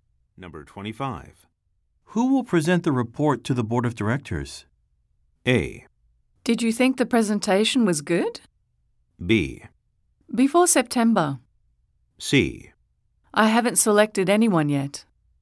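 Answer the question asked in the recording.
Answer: C: I haven't selected anyone yet.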